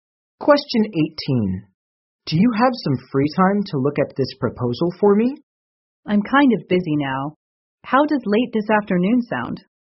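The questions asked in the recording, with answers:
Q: What does the woman mean?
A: She can look at the proposal late this afternoon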